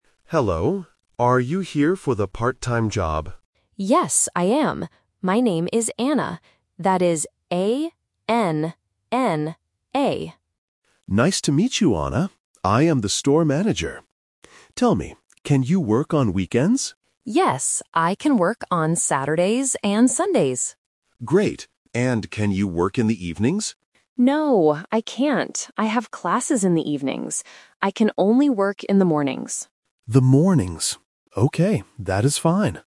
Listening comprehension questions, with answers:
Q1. What kind of job does Anna want?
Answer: A part-time job

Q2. What days can Anna work?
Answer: Saturdays and Sundays

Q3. When can Anna work?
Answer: In the mornings

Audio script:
Manager: Hello. Are you here for the part-time job?
Anna: Yes, I am. My name is Anna. That is A-N-N-A.
Manager: Nice to meet you, Anna. I am the store manager. Tell me, can you work on weekends?
Anna: Yes, I can work on Saturdays and Sundays.
Manager: Great. And can you work in the evenings?
Anna: No, I can't. I have classes in the evenings.

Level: A1